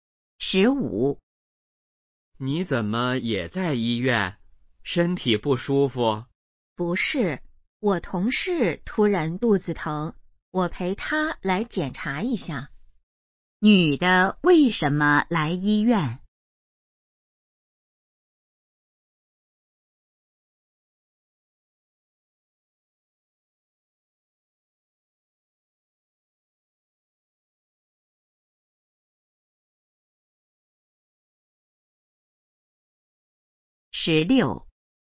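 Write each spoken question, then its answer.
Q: 女的为什么来医院?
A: 陪同事来检查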